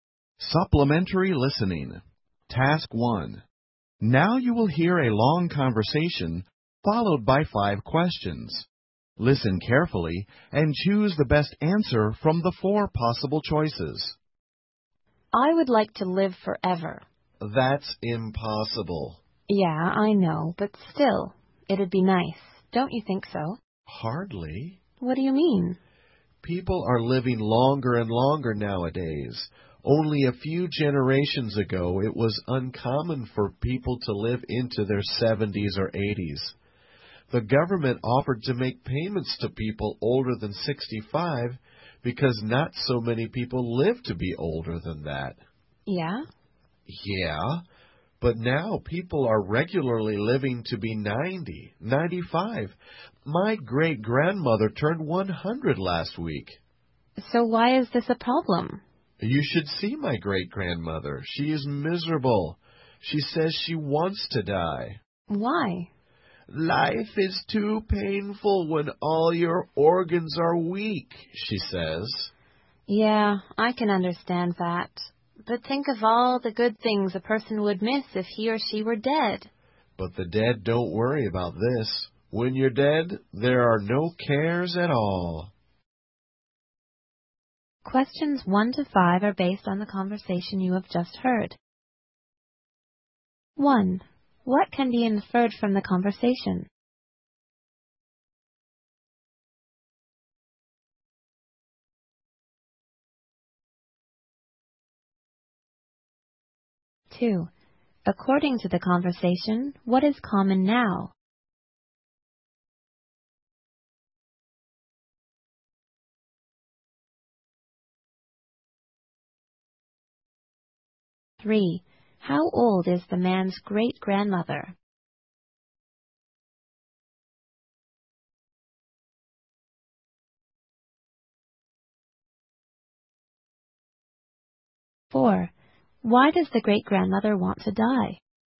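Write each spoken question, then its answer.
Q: According to the conversation, what is common now?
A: People living to 90 or 95.

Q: How old is the man's great-grandmother?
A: 100

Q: Why does the great-grandmother want to die?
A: Life is too painful because all her organs are weak.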